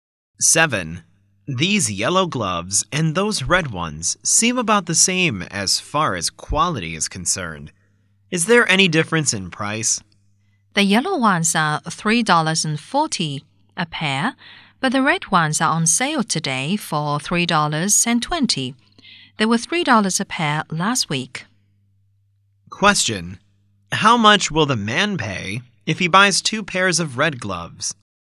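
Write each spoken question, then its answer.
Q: How much will the man pay if he buys 2 pairs of red gloves?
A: $6.40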